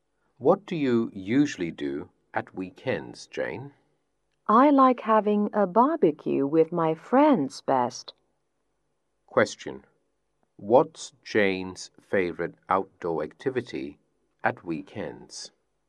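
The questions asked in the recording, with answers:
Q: What's Jane's favorite outdoor activity at weekends?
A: Having a barbecue with her friends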